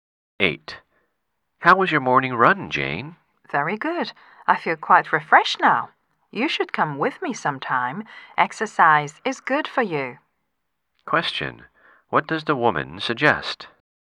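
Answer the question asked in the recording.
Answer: The man should go running with her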